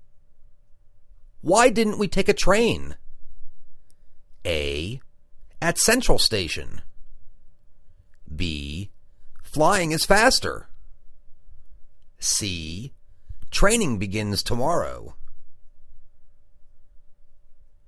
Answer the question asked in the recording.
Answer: Flying is faster.